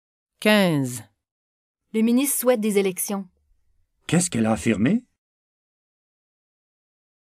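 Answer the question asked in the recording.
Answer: Elle a affirmé que le ministre souhaitait des élections.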